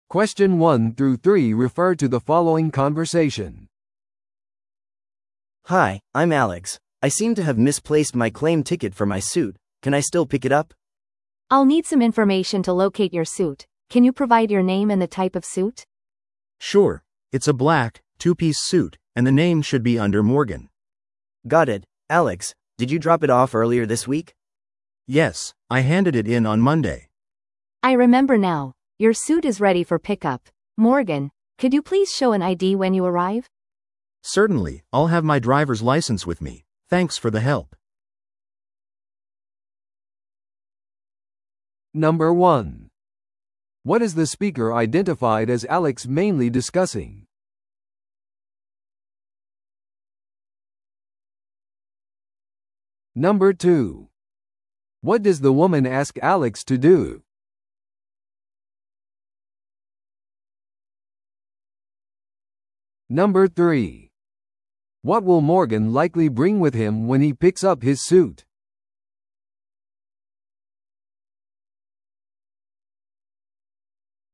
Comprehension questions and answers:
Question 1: What is the speaker identified as Alex mainly discussing?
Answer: 受取票なしで自分のスーツを取り戻そうとしている。

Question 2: What does the woman ask Alex to do?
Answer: 身元確認のために個人情報を提供する。

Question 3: What will Morgan likely bring with him when he picks up his suit?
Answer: 身分証としての運転免許証。

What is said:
A: Hi, I'm Alex. I seem to have misplaced my claim ticket for my suit. Can I still pick it up?
B: I'll need some information to locate your suit, can you provide your name and the type of suit?
C: Sure, it's a black, two-piece suit, and the name should be under Morgan.
A: Got it. Alex, did you drop it off earlier this week?
C: Yes, I handed it in on Monday.
B: I remember now. Your suit is ready for pickup, Morgan. Could you please show an ID when you arrive?
C: Certainly, I'll have my driver's license with me. Thanks for the help.